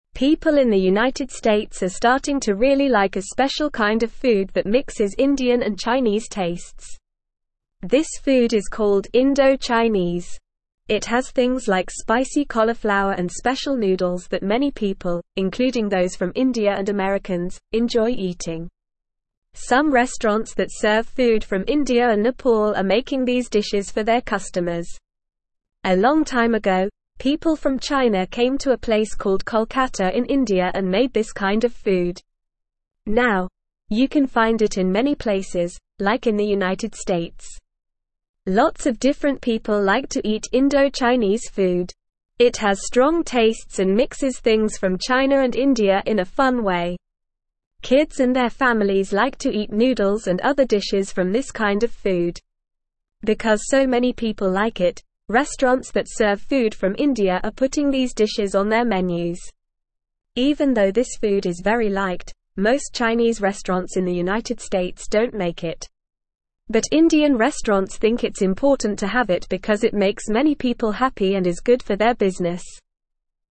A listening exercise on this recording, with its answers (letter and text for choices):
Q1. It has dishes like bland cauliflower and standard noodles that few people enjoy eating.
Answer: False

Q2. People from China came to Kolkata in India a long time ago and made this kind of food.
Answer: True

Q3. Restaurants that serve food from India are removing Indo-Chinese dishes from their menus because few people like it.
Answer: False

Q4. Most Chinese restaurants in the United States make Indo-Chinese food.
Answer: False

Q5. Indo-Chinese food is a special kind of food that mixes Indian and Chinese tastes.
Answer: True

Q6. Some restaurants in the United States that serve food from India and Nepal make Indo-Chinese dishes.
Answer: True

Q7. Indian restaurants think it's important to have Indo-Chinese food because it makes many people happy and is good for their business.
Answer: True

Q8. Indo-Chinese food is disliked by lots of different people, including kids and their families.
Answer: False

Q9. People in the United (1)______ are starting to really like a special kind of food that mixes Indian and Chinese tastes.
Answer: States

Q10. It has things like (2)______ cauliflower and special noodles that many people, including those from India and Americans, enjoy eating.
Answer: spicy

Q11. Some restaurants that (3)______ food from India and Nepal are making these dishes for their customers.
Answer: serve

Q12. A long time ago, people from China came to a place called Kolkata in India and (4)______ this kind of food.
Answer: made

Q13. It has strong tastes and mixes (5)______ from China and India in a fun way.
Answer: things

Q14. Kids and their families like to eat noodles and other dishes from this (6)______ of food.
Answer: kind

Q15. Even though this food is very liked, most (7)______ restaurants in the United States don't make it.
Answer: Chinese

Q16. But Indian restaurants think it's important to have it because it (8)______ many people happy and is good for their business.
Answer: makes

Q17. What is the name of the food that mixes Indian and Chinese tastes?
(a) Italian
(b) Mexican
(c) Indo-Chinese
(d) Japanese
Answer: (c) Indo-Chinese

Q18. Where did people from China make Indo-Chinese food a long time ago?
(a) New York City in the United States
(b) Kolkata in India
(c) Beijing in China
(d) London in England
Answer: (b) Kolkata in India

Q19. Who enjoys eating Indo-Chinese food?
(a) Many people, including those from India and Americans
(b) Only people from China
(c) Only kids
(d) Only people from Nepal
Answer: (a) Many people, including those from India and Americans

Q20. Why are restaurants that serve food from India putting Indo-Chinese dishes on their menus?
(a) Because it's cheap to make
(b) Because it's easy to make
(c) Because it's healthy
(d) Because many people like it and it's good for their business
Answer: (d) Because many people like it and it's good for their business

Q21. Do most Chinese restaurants in the United States make Indo-Chinese food?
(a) Yes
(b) No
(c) Sometimes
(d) Only on weekends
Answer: (b) No

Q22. Who thinks it's important to have Indo-Chinese food on their menus?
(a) American restaurants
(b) Chinese restaurants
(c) Italian restaurants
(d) Indian restaurants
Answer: (d) Indian restaurants

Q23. What kind of food do kids and their families like to eat from Indo-Chinese cuisine?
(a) Pizza and hamburgers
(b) Sushi and sashimi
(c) Noodles and other dishes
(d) Tacos and burritos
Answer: (c) Noodles and other dishes

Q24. Where can you find Indo-Chinese food?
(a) Many places, like in the United States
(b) Only in India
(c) Only in China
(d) Only in Nepal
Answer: (a) Many places, like in the United States

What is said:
People in the United States are starting to really like a special kind of food that mixes Indian and Chinese tastes. This food is called Indo-Chinese. It has things like spicy cauliflower and special noodles that many people, including those from India and Americans, enjoy eating. Some restaurants that serve food from India and Nepal are making these dishes for their customers. A long time ago, people from China came to a place called Kolkata in India and made this kind of food. Now, you can find it in many places, like in the United States.
Lots of different people like to eat Indo-Chinese food. It has strong tastes and mixes things from China and India in a fun way. Kids and their families like to eat noodles and other dishes from this kind of food. Because so many people like it, restaurants that serve food from India are putting these dishes on their menus. Even though this food is very liked, most Chinese restaurants in the United States don't make it. But Indian restaurants think it's important to have it because it makes many people happy and is good for their business.

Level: Level 1